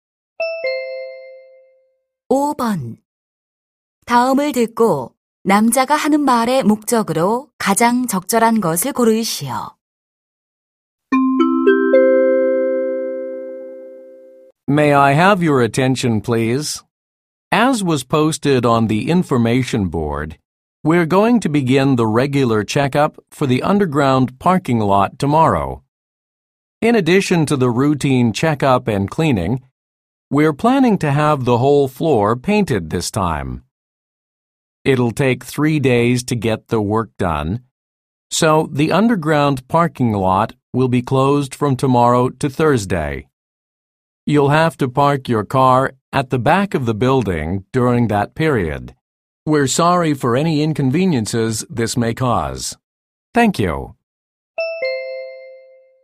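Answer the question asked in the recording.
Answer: 지하 주차장 점검 및 폐쇄를 알리려고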